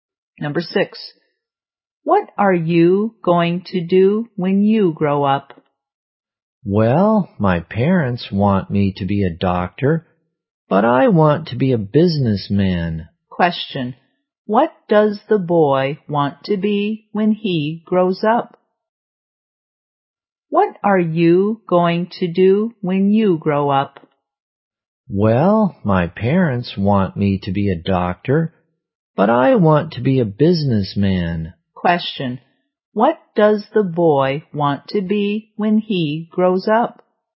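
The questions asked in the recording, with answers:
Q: What does the boy want to be when he grows up?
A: A businessman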